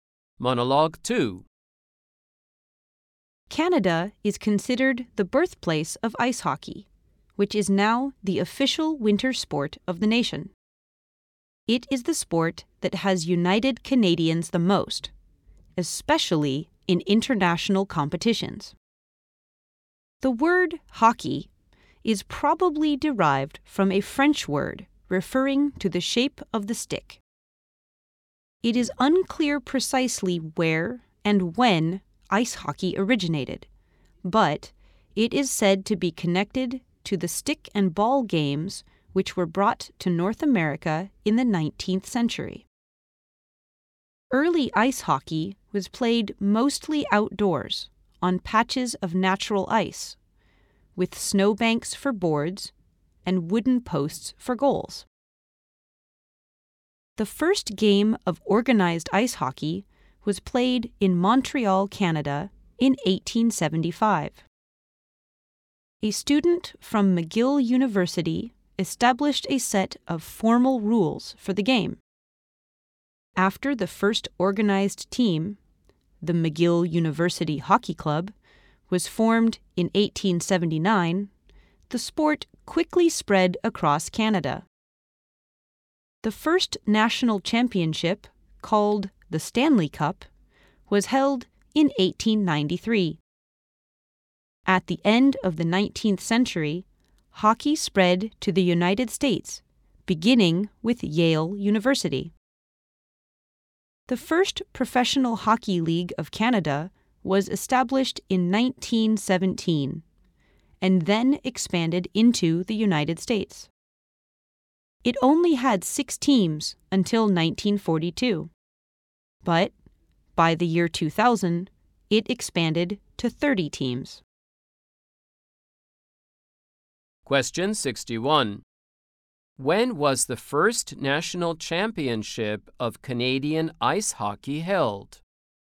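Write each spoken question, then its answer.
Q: When was the first national championship of Canadian ice hockey held?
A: In 1893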